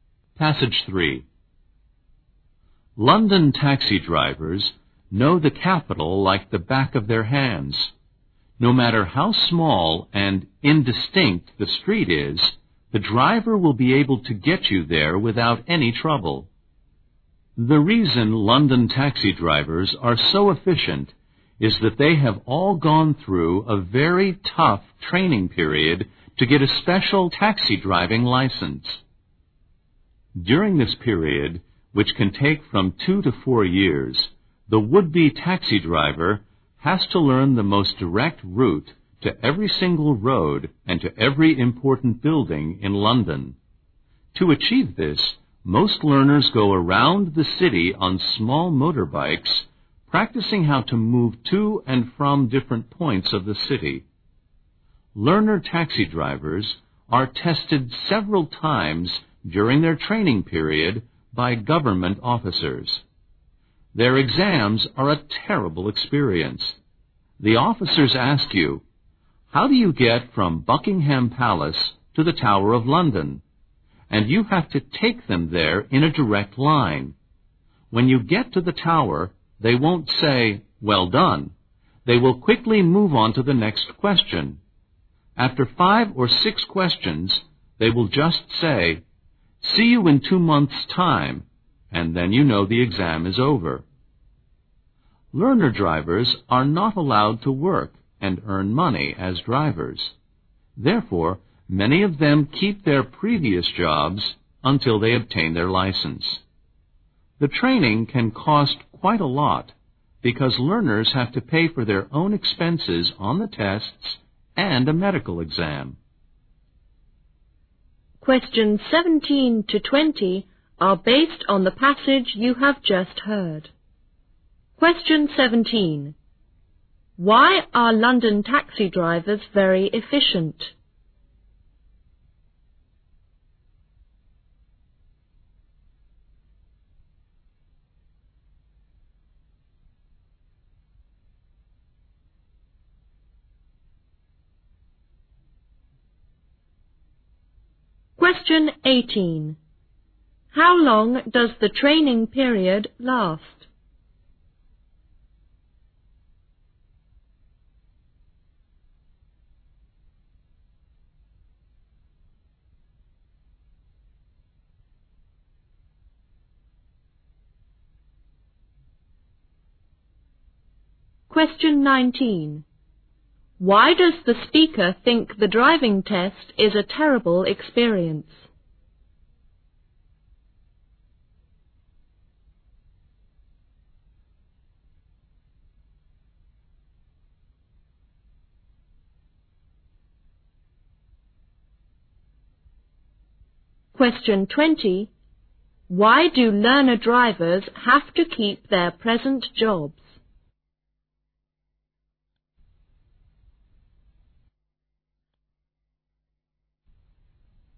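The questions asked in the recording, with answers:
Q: Why are London taxi drivers very efficient?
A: They go through very tough training to get a special licence.

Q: How long does the training period last?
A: 2 to 4 years

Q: Why do learner drivers have to keep their present jobs?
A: They are not allowed to work as drivers, and the training is expensive.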